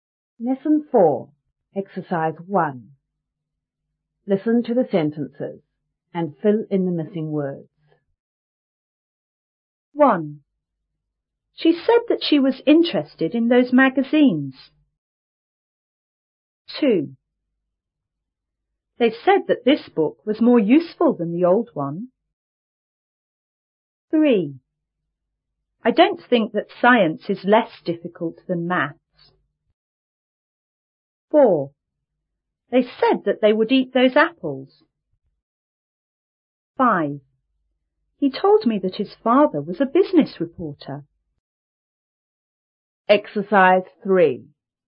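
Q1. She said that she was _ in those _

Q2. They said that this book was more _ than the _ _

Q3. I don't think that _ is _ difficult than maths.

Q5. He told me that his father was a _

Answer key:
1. interested; magazines
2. useful; old one
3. science; less
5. business reporter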